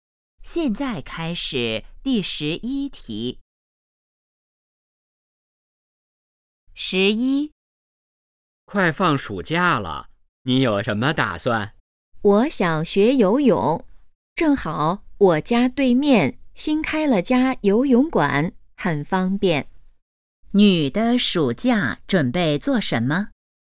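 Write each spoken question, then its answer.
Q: 女的暑假准备做什么?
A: 学游泳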